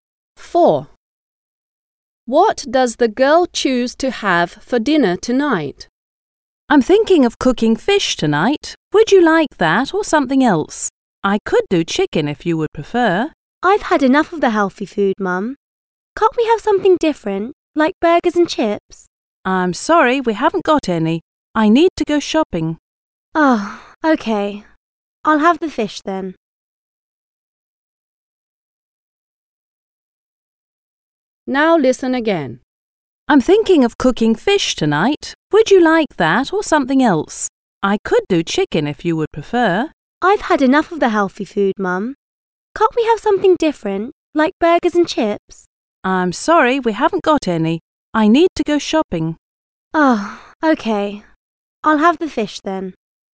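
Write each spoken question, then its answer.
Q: What does the girl choose to have for dinner tonight?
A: fish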